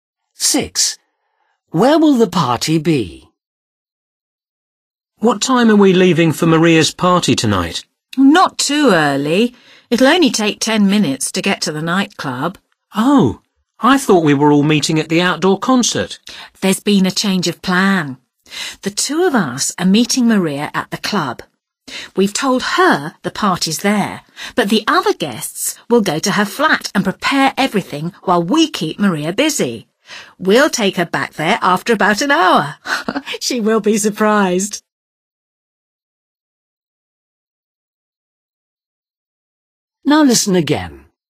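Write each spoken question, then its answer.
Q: Where will the party be?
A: at Maria's flat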